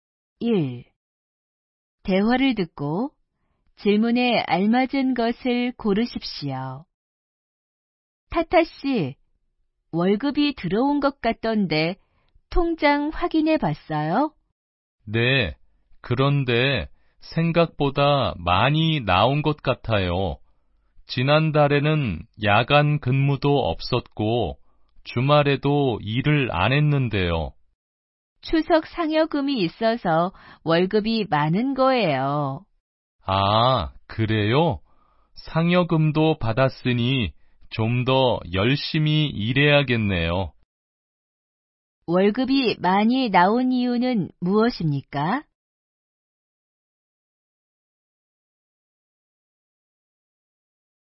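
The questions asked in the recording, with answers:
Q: 월급이 많이 나온 이유는 무엇입니까?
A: 추석 상여금이 있어서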